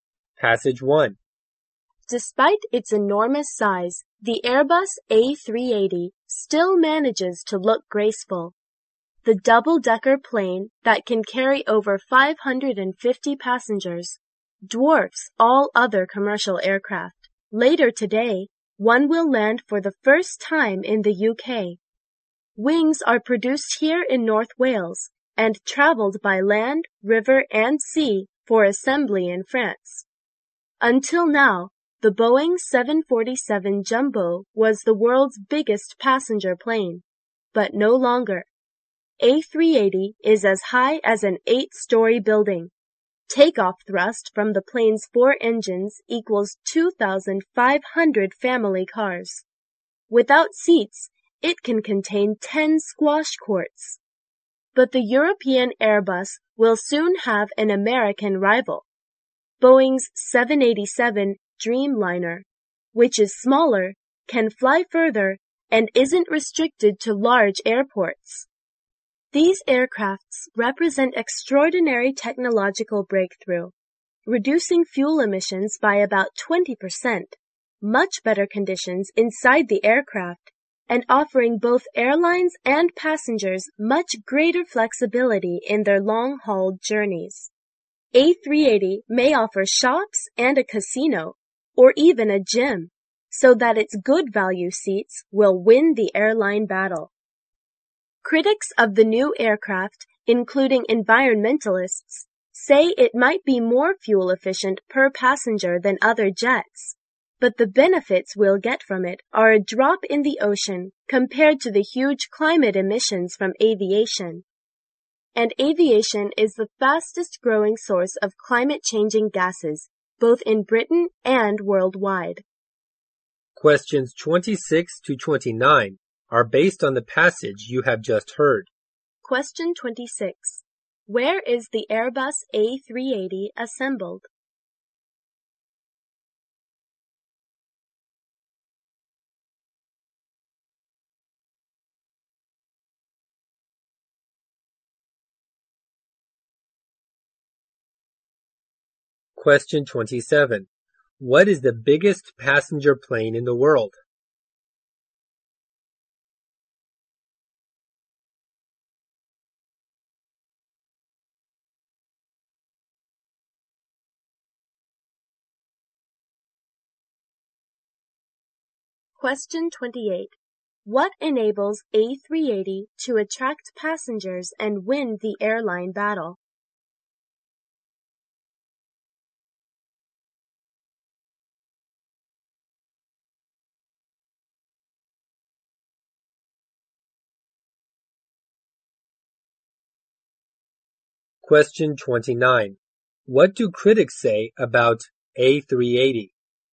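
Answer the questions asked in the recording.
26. In France
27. The Airbus A380
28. Shops, a casino or gym and good value seats
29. Its fuel efficiency benefits are tiny compared to aviation's huge emissions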